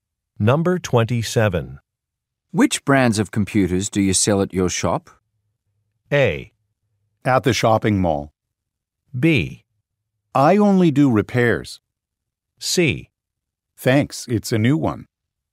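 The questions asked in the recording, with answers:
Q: Which brands of computers do you sell at your shop?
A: B: I only do repairs.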